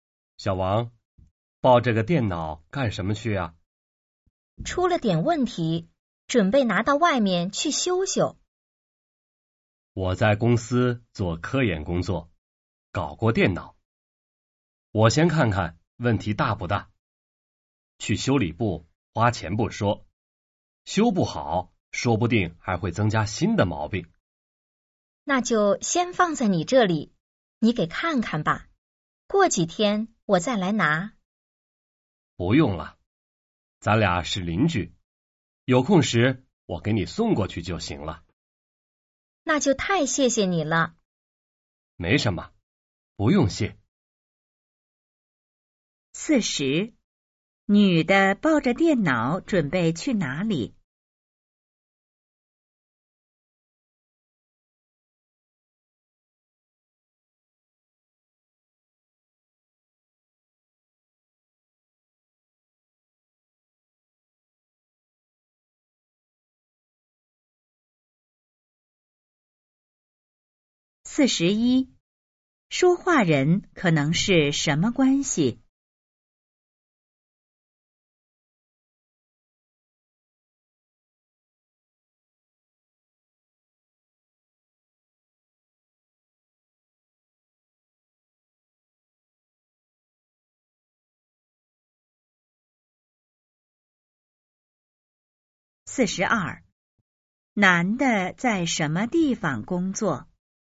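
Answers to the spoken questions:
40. 去修理部修电脑
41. 邻居
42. 公司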